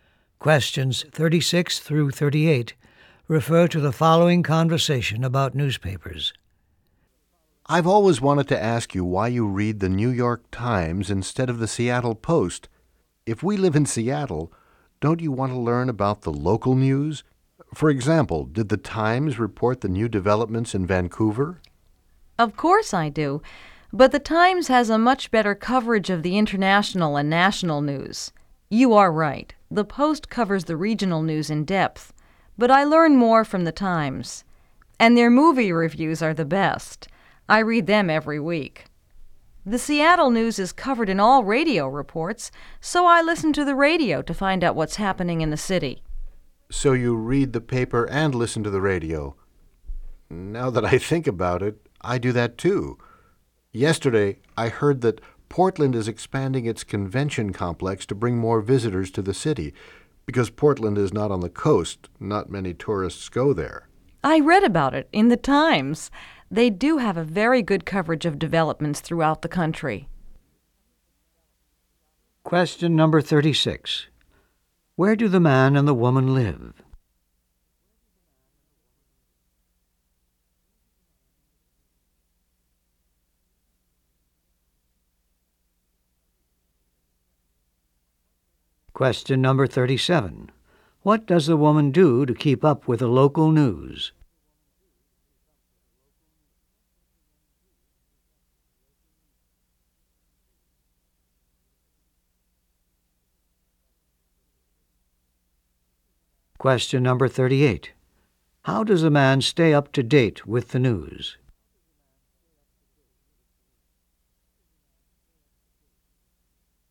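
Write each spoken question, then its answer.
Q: Where do the man and the woman live?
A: Seattle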